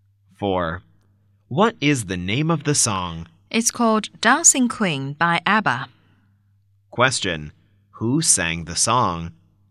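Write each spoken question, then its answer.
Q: Who sang the song?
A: ABBA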